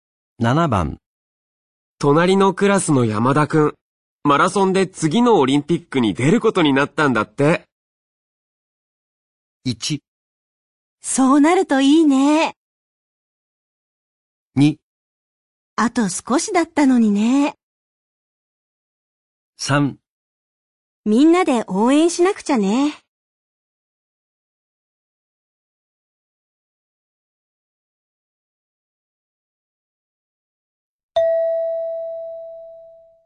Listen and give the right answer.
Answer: 3

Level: N3 Listening · Test 9